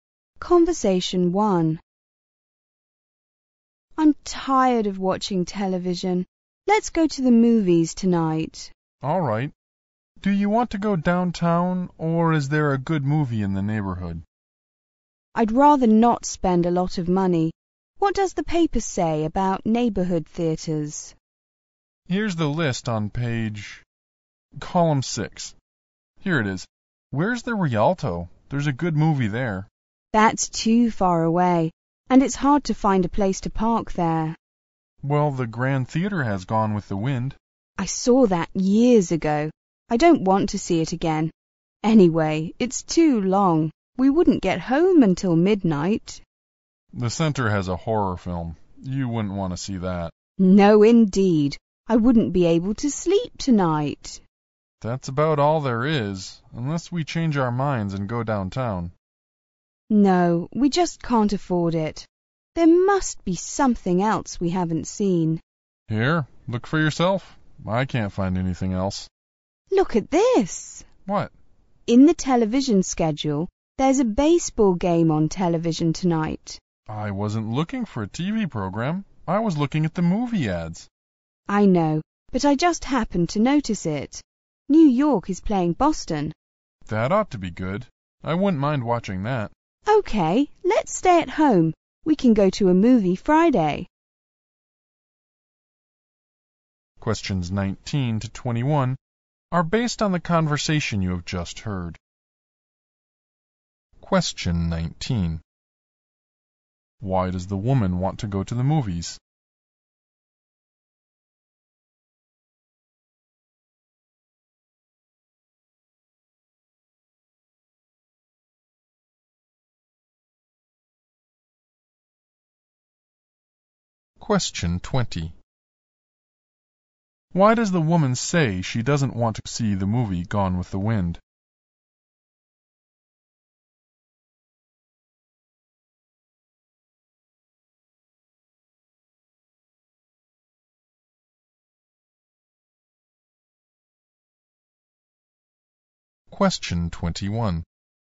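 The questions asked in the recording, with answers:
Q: Why does the woman want to go to the movies?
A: She is tired of watching television

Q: Why does the woman say she doesn't want to see the movie Gone with the Wind?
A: She saw it years ago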